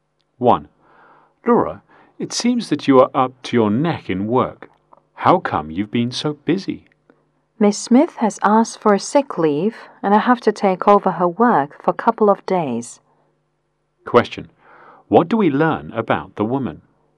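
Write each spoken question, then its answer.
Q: What do we learn about the woman?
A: She is busy taking over Miss Smith's work for a couple of days.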